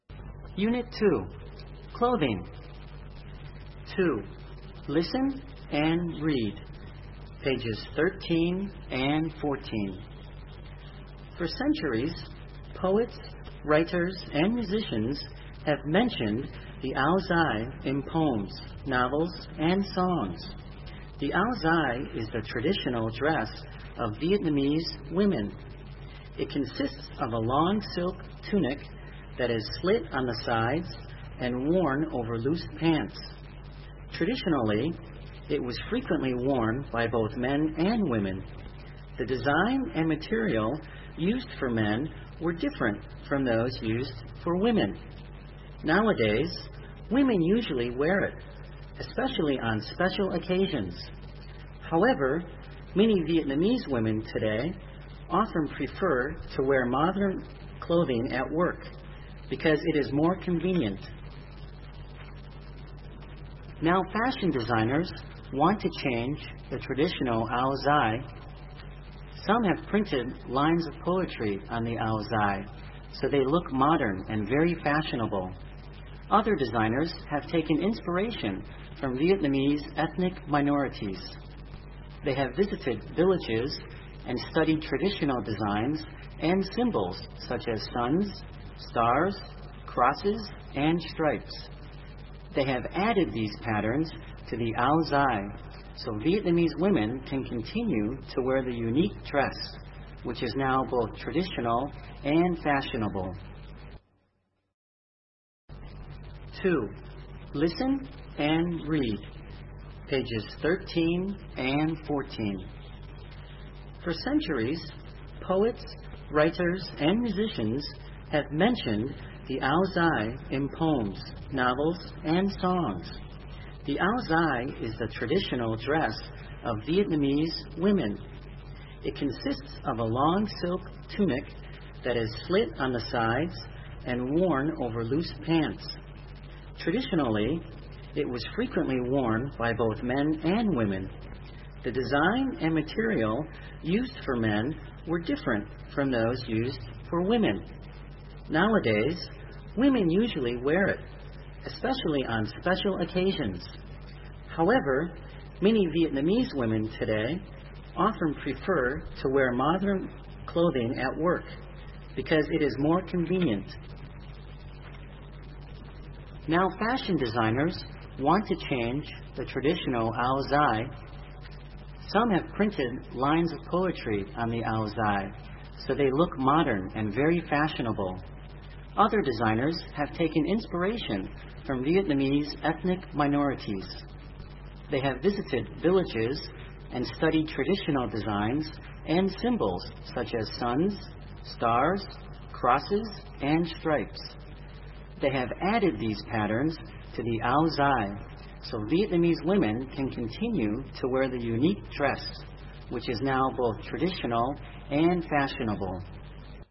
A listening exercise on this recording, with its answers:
b) Answer the questions. (Trả lời câu hỏi.)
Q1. Who used to wear the ao dai by tradition?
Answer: By tradition, Vietnamese men and women used to wear the ao dai.

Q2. Why do the majority of Vietnamese women prefer to wear modem clothing at work these days?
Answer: The majority of Vietnamese women prefer to wear modern clothing at work these days because it is more convenient.

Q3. What have fashion designers done to modernize the ao dai?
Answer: Fashion designers have changed the designs and patterns of the traditional ao dai by printed lines of poetry or adding the designs and symbols of ethnic minorities to them.

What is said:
For centuries, poets, writers and musicians have mentioned the ao dai in poems, novels and songs. The ao dai is the traditional dress of Vietnamese women. It consists of a long silk tunic that is slit on the sides and worn over loose pants. Traditionally, it was frequently worn bv both men and women. The desian and material used for men were different from those used for women. Nowadays, women usually wear it, especially on special occasions. However, many Vietnamese women today often prefer to wear modern clothing at work, because it is more convenient.
Now fashion designers want to change the traditional ao dai. Some have printed lines of poetry on the ao dai, so they look modern and very fashionable. Other designers have taken inspiration from Vietnam's ethnic minorities.
They have visited villages and studied traditional designs and symbols such as suns, stars, crosses, and stripes. They have added these patterns to the ao dai, so Vietnamese women can continue to wear the unique dress, which is now both traditional and fashionable.

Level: Tiếng Anh 9